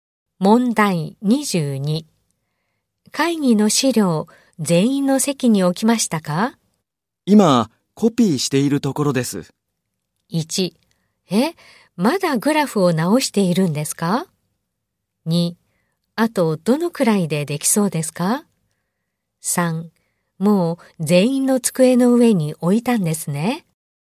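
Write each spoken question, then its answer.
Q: 会議の資料、全員の席に置きましたか?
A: 2: あとどのくらいでできそうですか?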